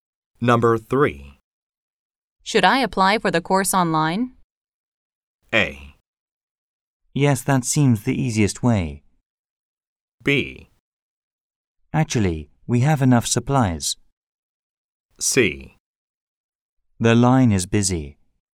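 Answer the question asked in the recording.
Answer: A: Yes, that seems the easiest way.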